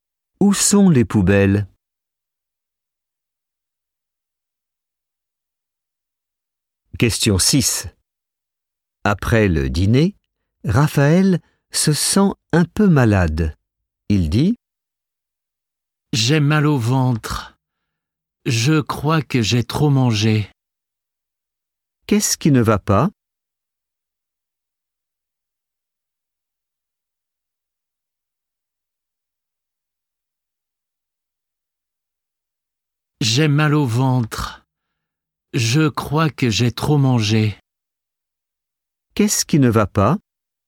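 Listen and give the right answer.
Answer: Il a mal au ventre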